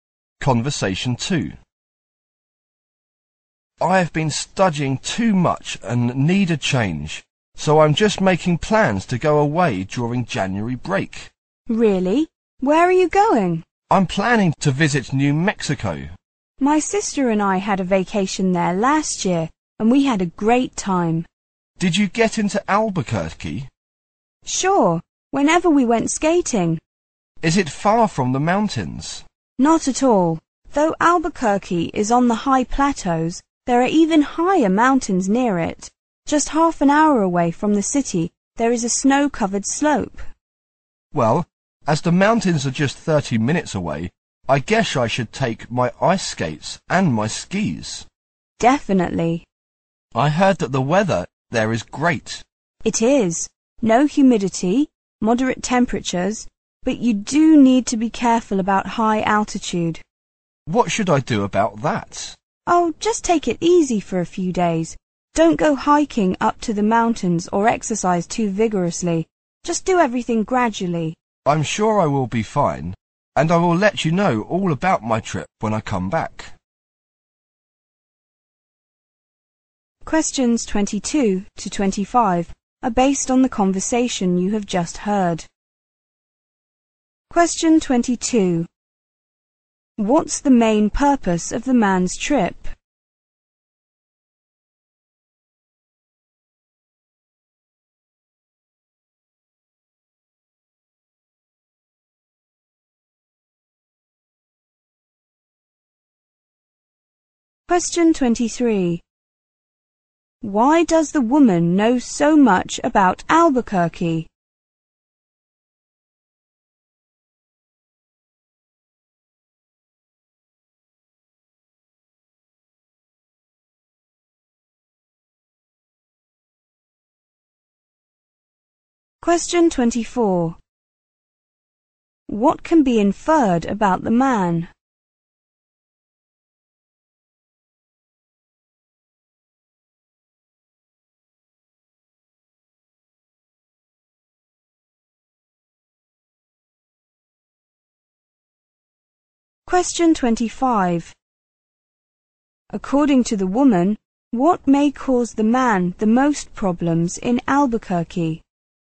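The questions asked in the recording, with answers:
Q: What's the main purpose of the man's trip?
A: To take a break from too much studying

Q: Why does the woman know so much about Albuquerque?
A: She had a vacation there with her sister last year

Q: According to the woman, what may cause the man the most problems in Albuquerque?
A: The high altitude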